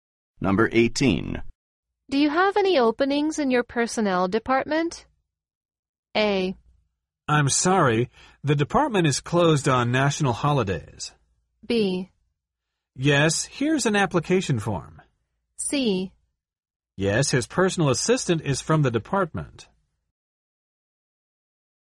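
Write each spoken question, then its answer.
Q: Do you have any openings in your personnel department?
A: B: Yes, here's an application form.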